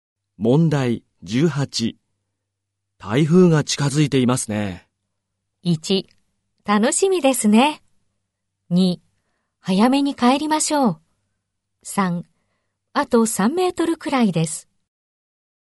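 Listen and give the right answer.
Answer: 2: 早めに帰りましょう。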